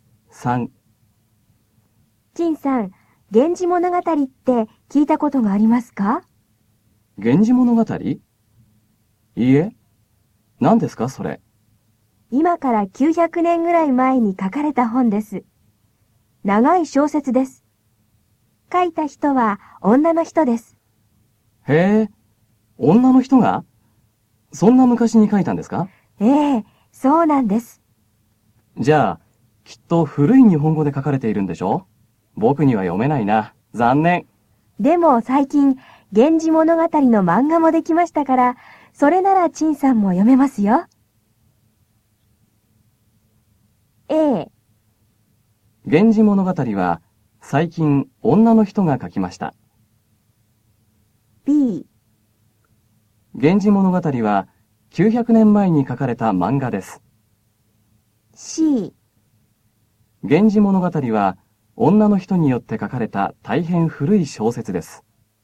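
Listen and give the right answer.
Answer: C: 源氏物語は女の人によって書かれた大変古い小説です。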